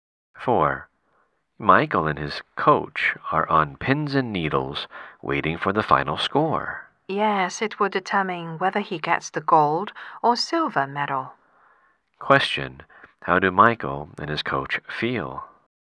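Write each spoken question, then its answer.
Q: How do Michael and his coach feel?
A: Nervous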